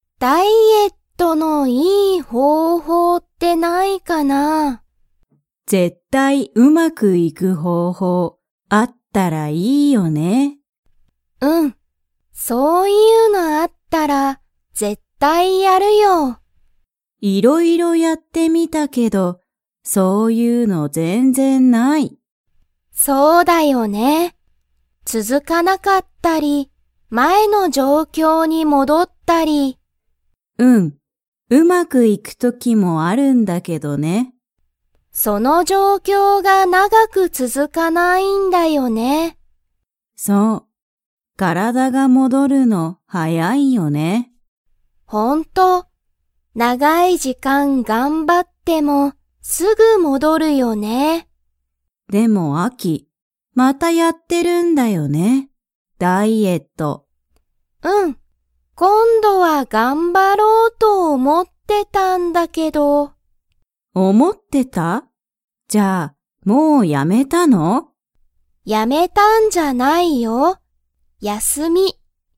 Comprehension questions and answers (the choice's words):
Comprehension Quiz (Skip if you don't understand the conversation yet)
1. アキはダイエットのいい____が知(し)りたい。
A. 状況(じょうきょう)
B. 時間(じかん)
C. 休(やす)み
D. 方法(ほうほう)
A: 方法(ほうほう)

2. アキのダイエットは、いつもうまくいきますか。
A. はい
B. いいえ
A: いいえ

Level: Level 2